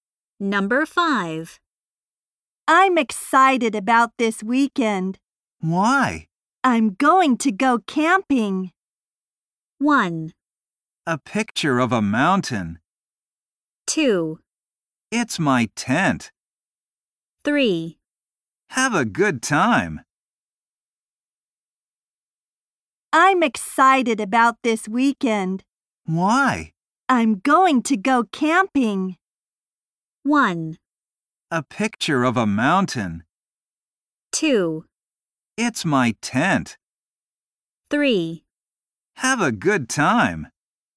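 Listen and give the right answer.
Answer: 3: Have a good time.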